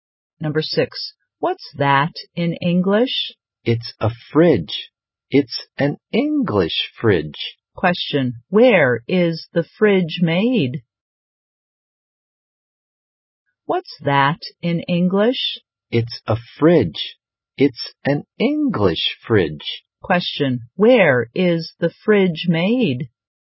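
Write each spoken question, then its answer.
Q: where is the fridge made?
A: In England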